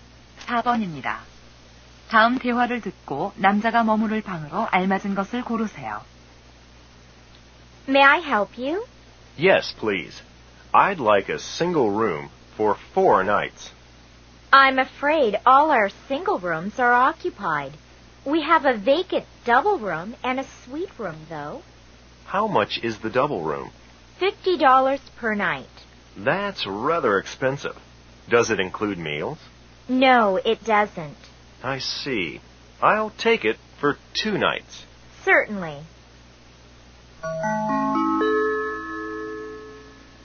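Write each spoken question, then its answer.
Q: 다음 대화를 듣고 남자가 머무를 방으로 알맞은 것을 고르세요.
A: 더블룸 (2박)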